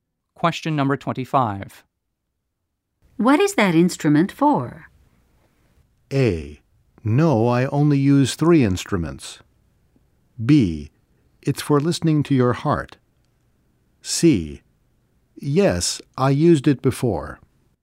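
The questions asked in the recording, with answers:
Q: What is that instrument for?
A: B: It's for listening to your heart.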